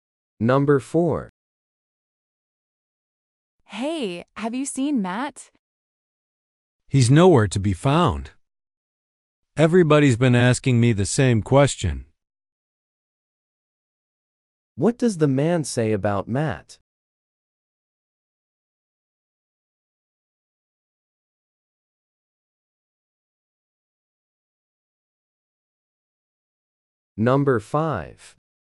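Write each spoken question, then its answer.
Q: What does the man say about Matt?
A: Nobody knows where Matt is.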